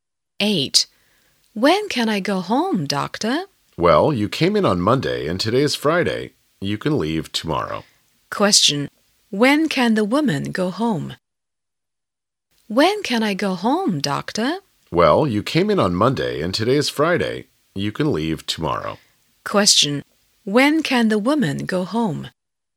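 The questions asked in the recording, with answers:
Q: When can the woman go home?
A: Tomorrow (Saturday)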